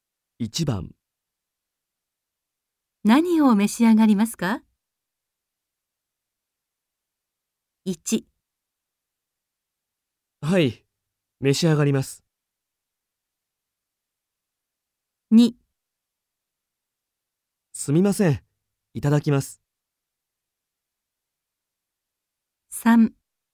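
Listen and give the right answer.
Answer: 3: じゃあコーヒーを。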